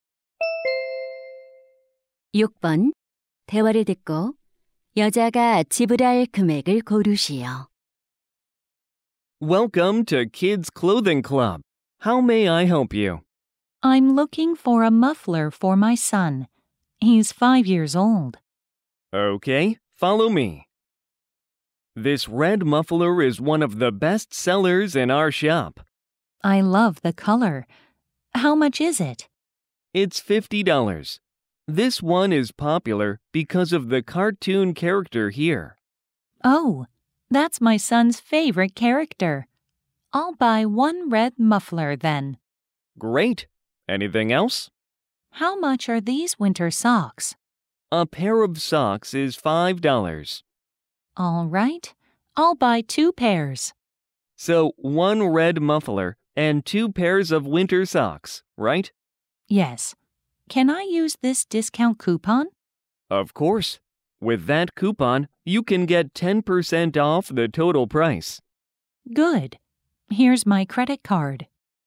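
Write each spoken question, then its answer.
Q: 대화를 듣고 여자가 지불할 금액을 고르시오.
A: $54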